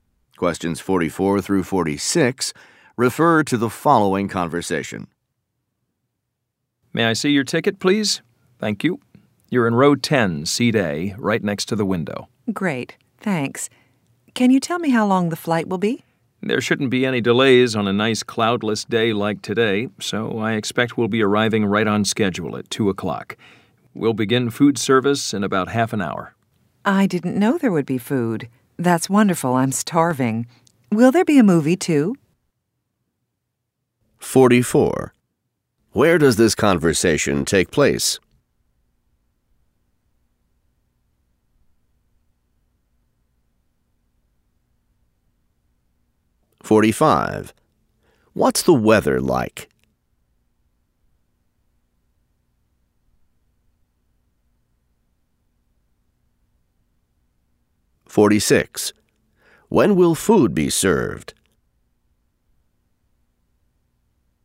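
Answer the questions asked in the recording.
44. On an airplane
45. Nice and cloudless
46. In about half an hour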